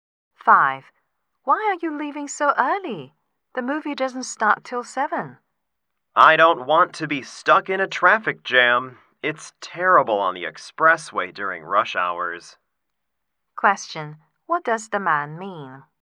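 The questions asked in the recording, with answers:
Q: What does the man mean?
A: He is leaving early to avoid rush-hour traffic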